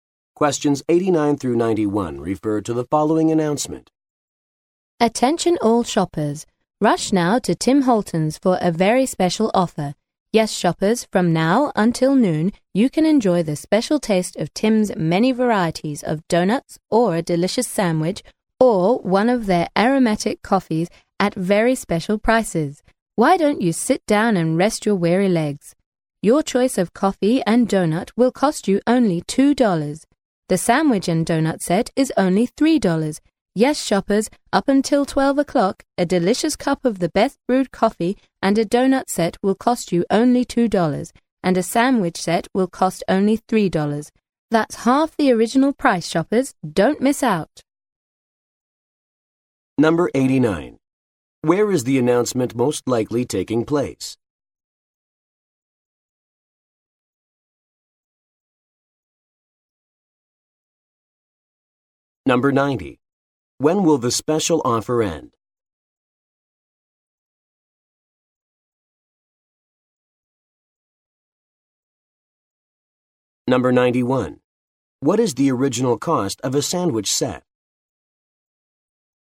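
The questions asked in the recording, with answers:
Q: When will the special offer end?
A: At noon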